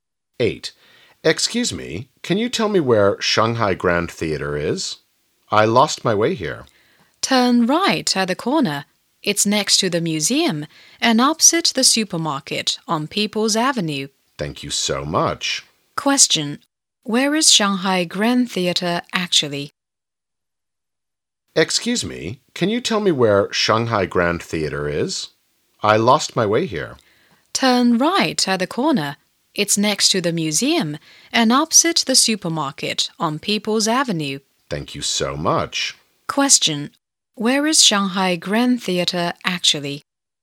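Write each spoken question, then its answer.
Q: Question: where is Shanghai Grand Theater actually?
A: Next to the museum and opposite the supermarket on People's Avenue.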